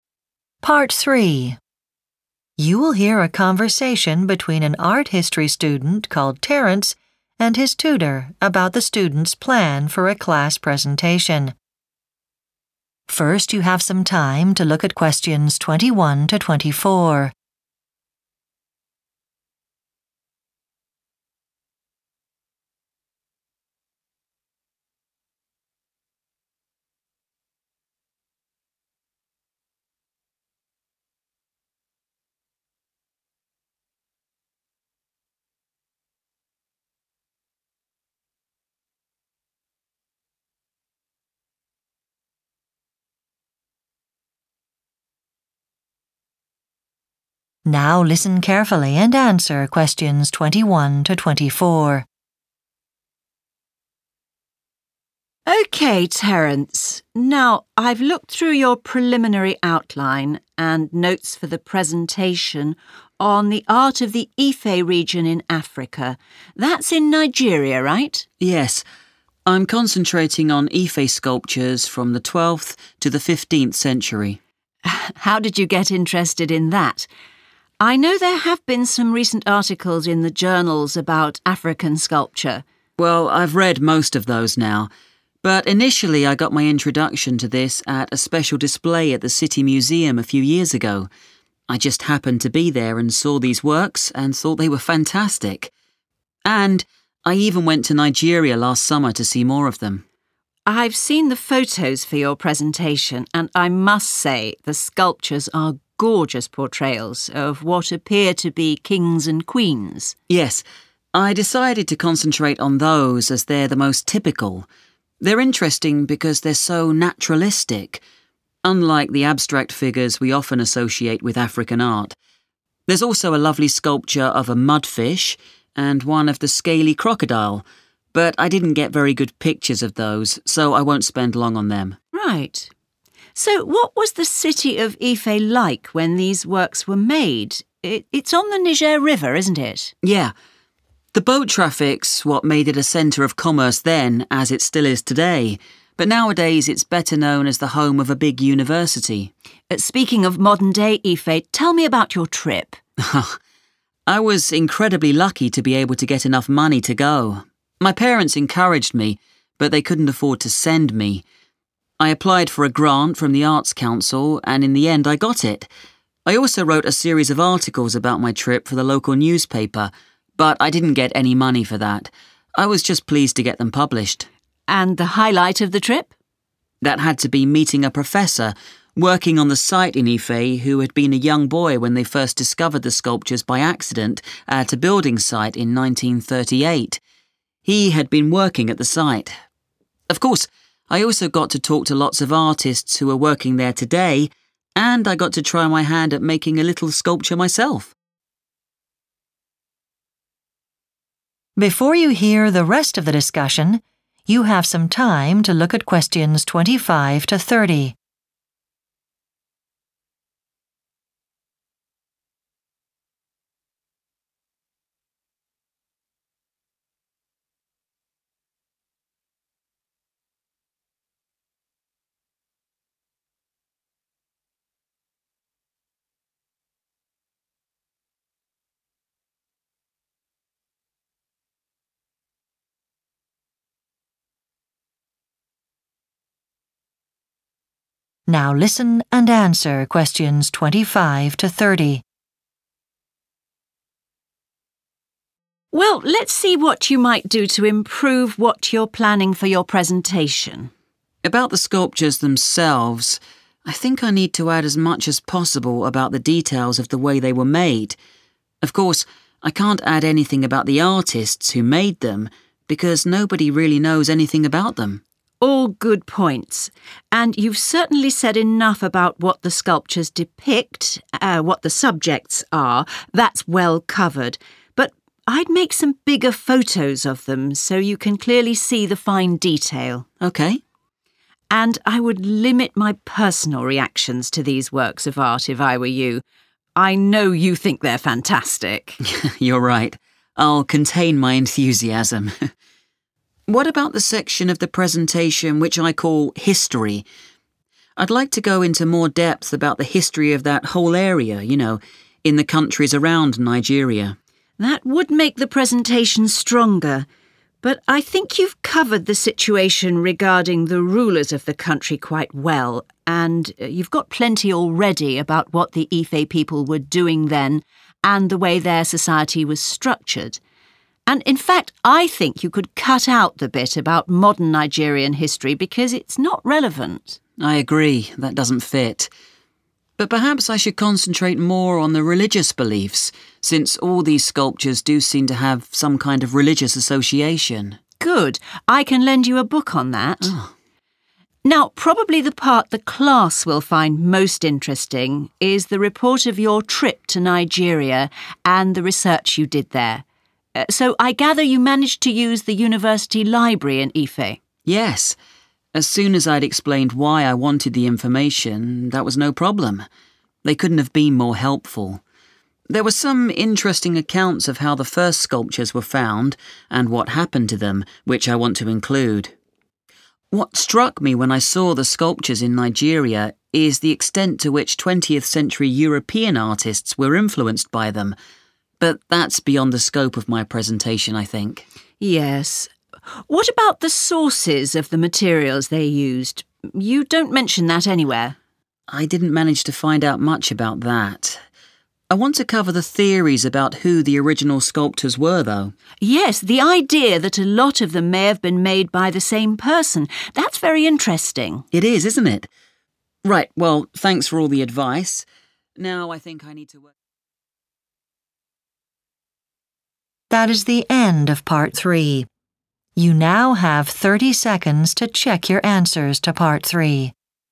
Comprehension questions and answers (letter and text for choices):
Choose the correct letter, A, B or C.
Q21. What first attracted Terence to the topic of Ife sculptures?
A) He read several journal articles.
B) He attended an exhibition.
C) He spent some time in Nigeria.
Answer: B) He attended an exhibition.

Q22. In his presentation Terence will focus on sculptures featuring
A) abstract designs.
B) fish and wild animals.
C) people.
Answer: C) people.

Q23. How did Terence finance his trip to Ife?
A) He received money from an arts organisation.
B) His mother and father paid for him.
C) He wrote about the trip for a newspaper.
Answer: A) He received money from an arts organisation.

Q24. What was most memorable for Terence about his trip?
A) helping at an archaeological site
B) the professor he met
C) the artists he got to know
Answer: B) the professor he met